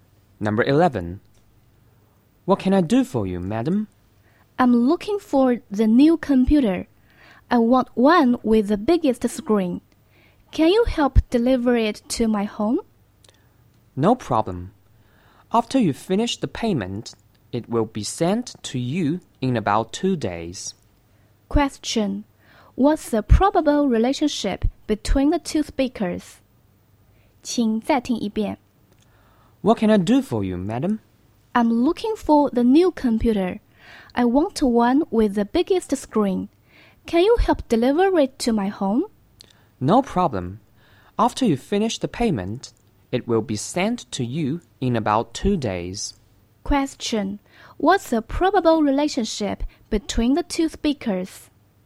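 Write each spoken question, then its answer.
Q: Question. What's the probable relationship between the two speakers?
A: Shop assistant and customer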